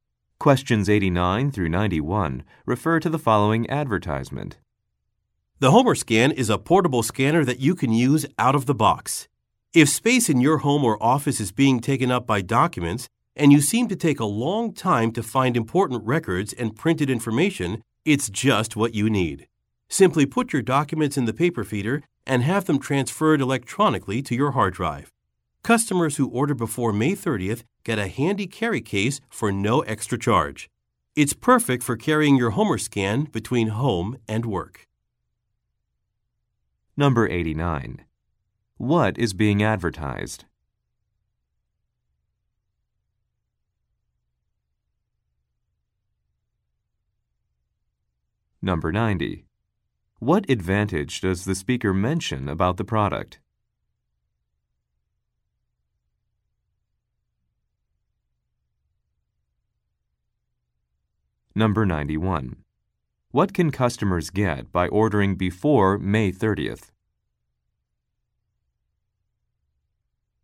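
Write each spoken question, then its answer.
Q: What is being advertised?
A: A portable scanner

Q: What can customers get by ordering before May 30th?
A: A free carry case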